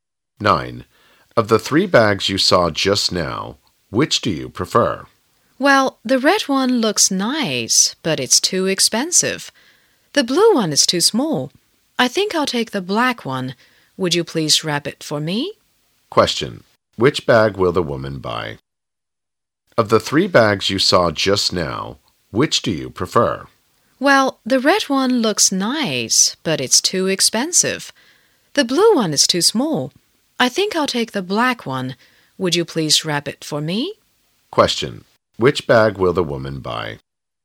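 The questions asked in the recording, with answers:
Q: Which bag will the woman buy?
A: The black one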